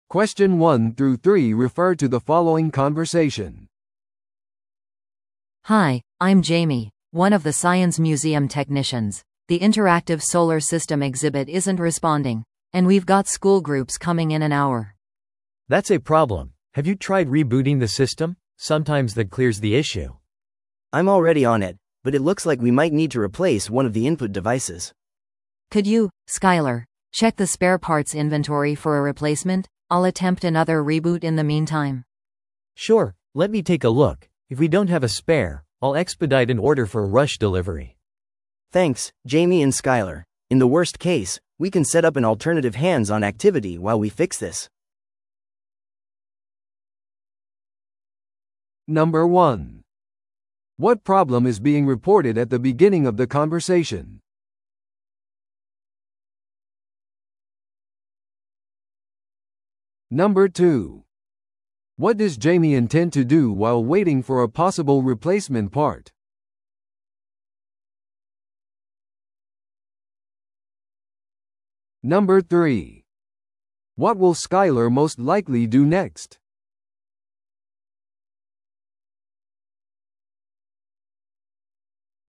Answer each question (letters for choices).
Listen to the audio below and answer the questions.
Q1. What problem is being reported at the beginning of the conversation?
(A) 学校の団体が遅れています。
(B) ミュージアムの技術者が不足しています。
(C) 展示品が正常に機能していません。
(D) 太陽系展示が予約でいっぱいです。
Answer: C

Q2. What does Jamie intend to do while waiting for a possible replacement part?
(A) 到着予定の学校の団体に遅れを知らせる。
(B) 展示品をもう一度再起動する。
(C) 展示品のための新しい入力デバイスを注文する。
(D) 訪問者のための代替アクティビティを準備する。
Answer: B

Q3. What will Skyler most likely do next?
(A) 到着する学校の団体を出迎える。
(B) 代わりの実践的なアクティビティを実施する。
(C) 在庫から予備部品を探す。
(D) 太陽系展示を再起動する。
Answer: C

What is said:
A: Hi, I'm Jamie, one of the science museum technicians. The interactive solar system exhibit isn't responding, and we've got school groups coming in an hour.
B: That's a problem. Have you tried rebooting the system? Sometimes that clears the issue.
C: I'm already on it, but it looks like we might need to replace one of the input devices.
A: Could you, Skyler, check the spare parts inventory for a replacement? I'll attempt another reboot in the meantime.
B: Sure, let me take a look. If we don't have a spare, I'll expedite an order for a rush delivery.
C: Thanks, Jamie and Skyler. In the worst case, we can set up an alternative hands-on activity while we fix this.